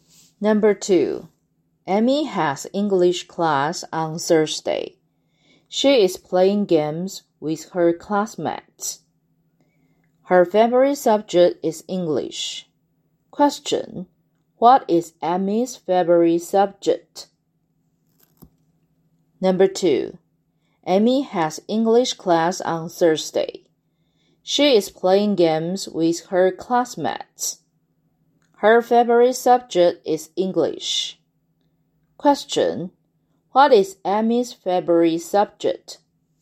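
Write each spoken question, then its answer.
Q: what is Amy's favorite subject?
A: English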